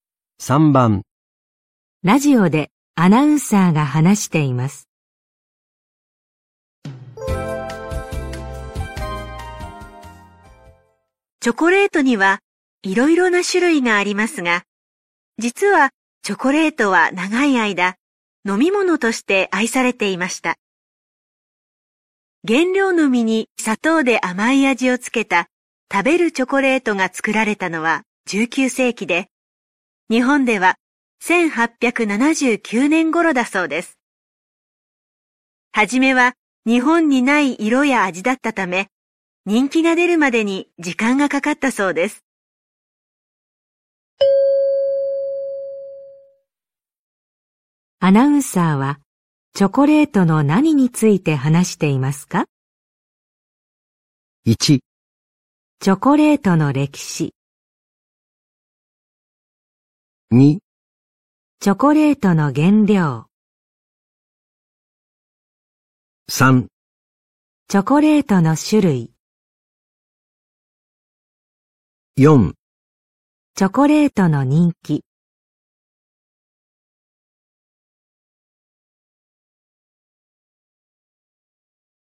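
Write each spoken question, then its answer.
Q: アナウンサーはチョコレートの何について話していますか?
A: 1: チョコレートの歴史。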